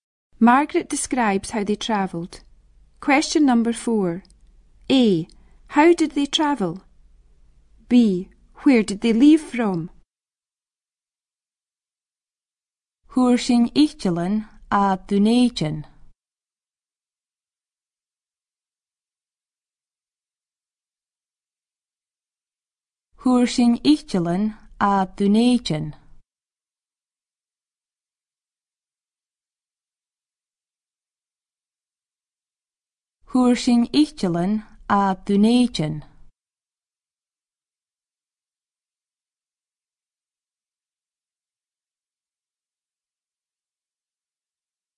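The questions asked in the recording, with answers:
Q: How did they travel?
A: By plane

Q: Where did they leave from?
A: Edinburgh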